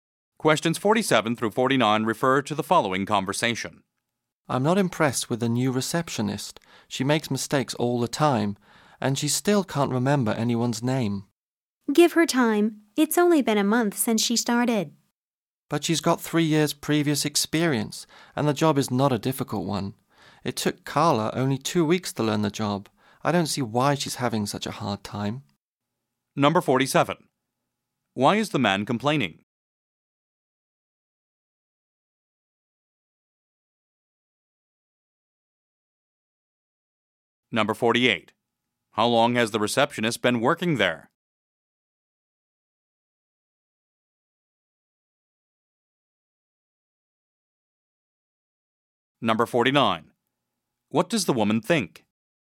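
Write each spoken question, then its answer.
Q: Why is the man complaining?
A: The new receptionist makes mistakes and can't remember names

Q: How long has the receptionist been working there?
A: A month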